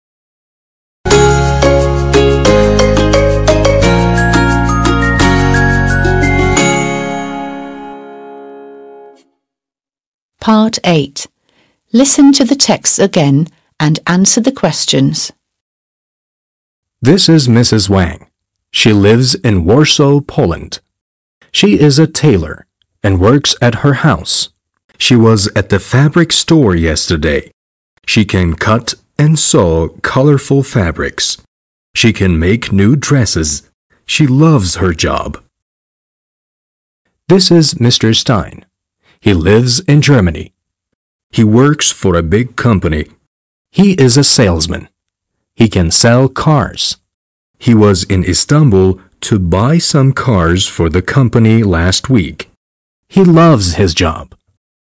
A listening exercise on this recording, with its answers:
8. Listen to the texts again and answer the questions.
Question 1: What does Mrs. Wang do?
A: She is a tailor.

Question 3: Was Mrs. Wang at the fabric store yesterday?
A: Yes, she was.

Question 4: What does Mr. Stein do?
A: He is a salesman.

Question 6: Was Mr. Stein in Amsterdam last week?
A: No, he wasn't. He was in İstanbul last week.

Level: 6. Sınıf